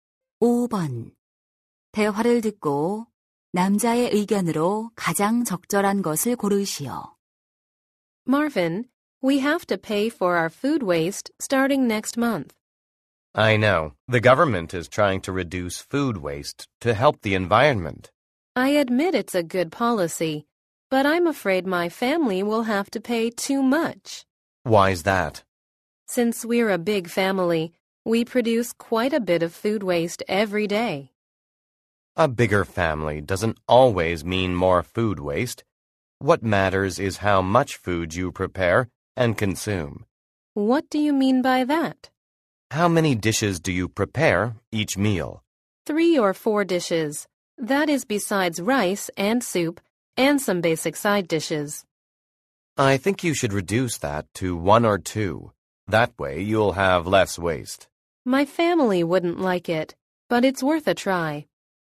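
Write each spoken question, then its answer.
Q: 대화를 듣고 남자의 의견으로 가장 적절한 것을 고르시오.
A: 음식물 쓰레기를 줄이려면 식사마다 준비하는 반찬 수를 줄여야 한다.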